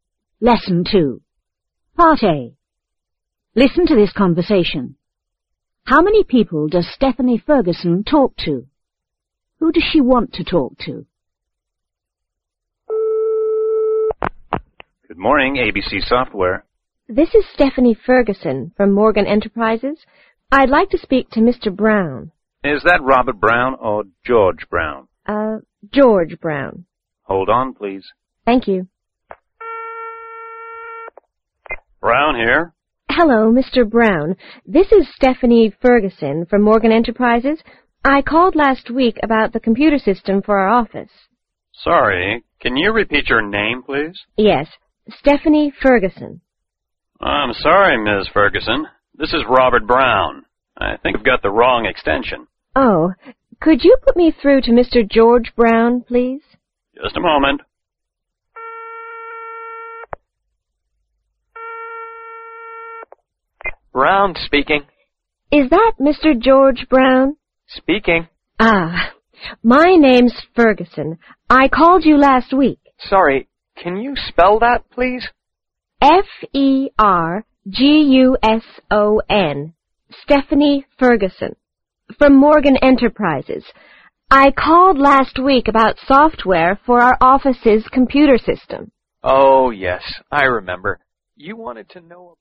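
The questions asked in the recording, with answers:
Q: How many people does Stephanie Ferguson talk to?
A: Three

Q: Who does she want to talk to?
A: George Brown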